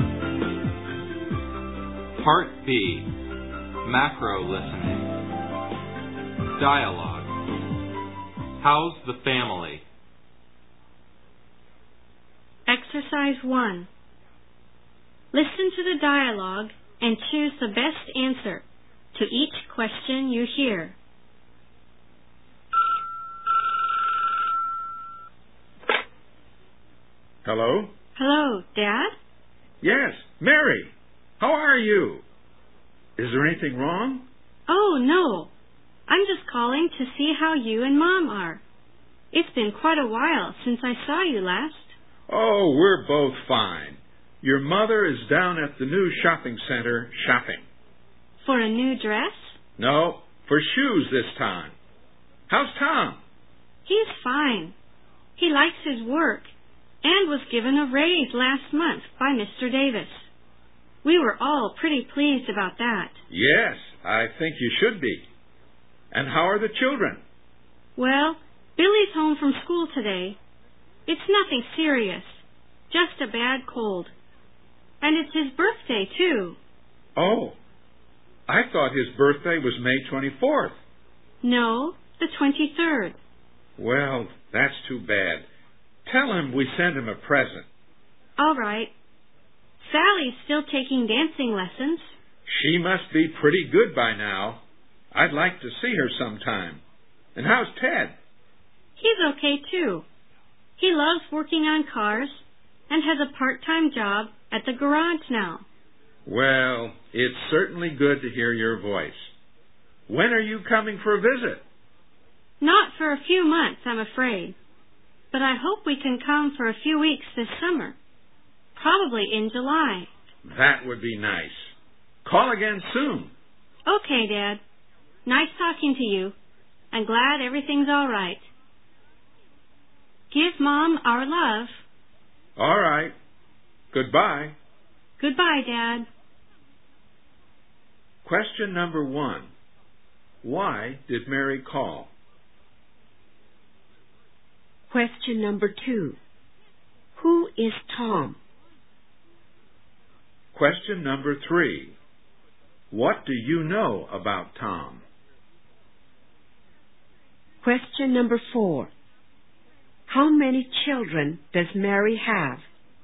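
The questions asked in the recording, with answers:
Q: Why did Mary call?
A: To see how her parents are

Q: What do you know about Tom?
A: He likes his work and got a raise last month

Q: How many children does Mary have?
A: Three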